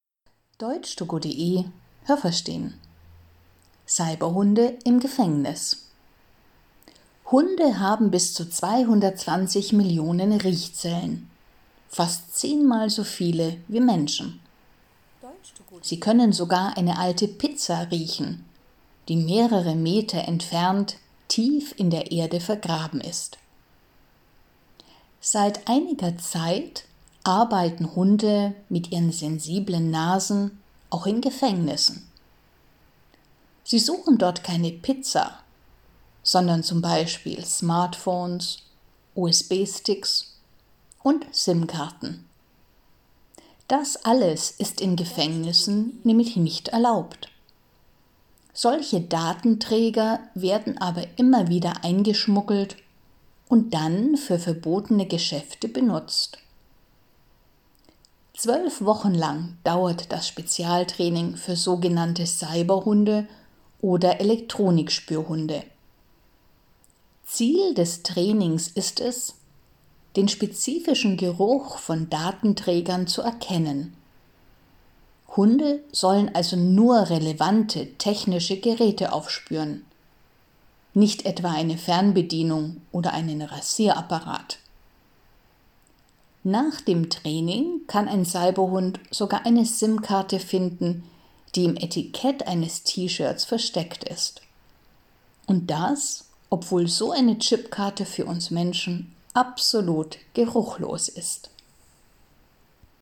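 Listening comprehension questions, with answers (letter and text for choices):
Was haben Sie gehört? Es gibt nur eine korrekte Antwort.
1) Hunde können _____ Riechzellen haben.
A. 220 Millionen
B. zehn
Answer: A. 220 Millionen

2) In Gefängnissen suchen Hunde ...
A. Pizzas, die in der Erde vergraben sind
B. Smartphones, USB-Sticks und SIM-Karten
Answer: B. Smartphones, USB-Sticks und SIM-Karten

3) Smartphones, USB-Sticks und SIM-Karten ...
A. darf man im Gefängnis nur für Geschäfte benutzen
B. sind im Gefängnis verboten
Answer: B. sind im Gefängnis verboten

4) Das Training für Cyberhunde dauert ...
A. 12 Wochen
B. 12 Monate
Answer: A. 12 Wochen

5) Hunde lernen in diesem Training, ...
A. Datenträger, Fernbedienungen und Rasierapparate zu finden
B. Datenträger von anderen technischen Geräten zu unterscheiden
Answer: B. Datenträger von anderen technischen Geräten zu unterscheiden

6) Cyberhunde können auch ...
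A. ein T-Shirt finden, auf dem „Smartphone" oder „SIM-Karte" steht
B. eine SIM-Karte finden, die im Etikett eines T-Shirts versteckt ist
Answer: B. eine SIM-Karte finden, die im Etikett eines T-Shirts versteckt ist

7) Menschen können SIM-Karten ...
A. auch ein bisschen riechen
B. überhaupt nicht riechen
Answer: B. überhaupt nicht riechen

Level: A2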